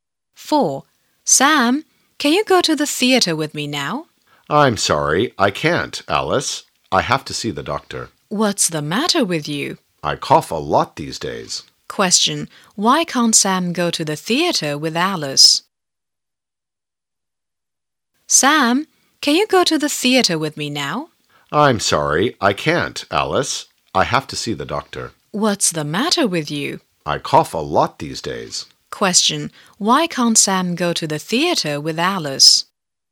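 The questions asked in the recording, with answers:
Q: Why can't Sam go to the theater with Alice?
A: He has to see the doctor because he coughs a lot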